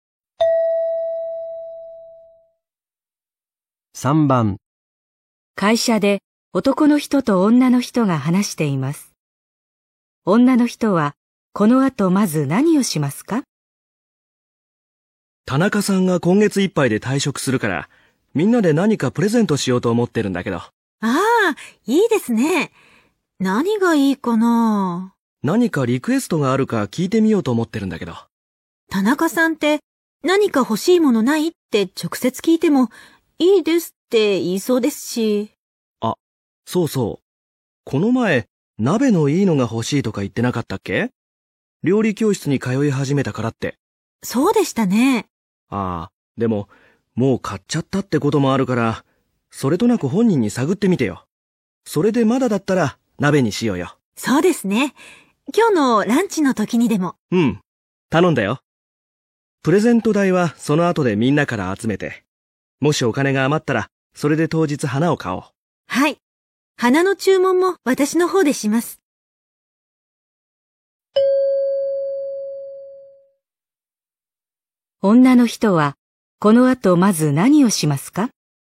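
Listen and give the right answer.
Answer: 田中さんに鍋をもう買ったかそれとなく聞く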